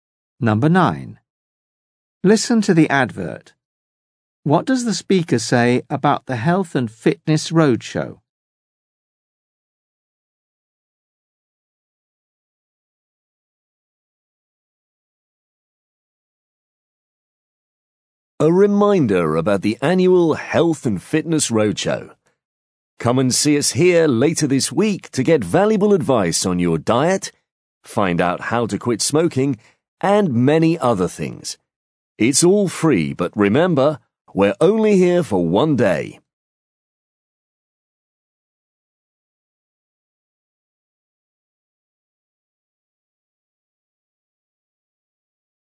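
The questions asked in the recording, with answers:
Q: What does the speaker say about the health and fitness roadshow?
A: It's free and only there for one day.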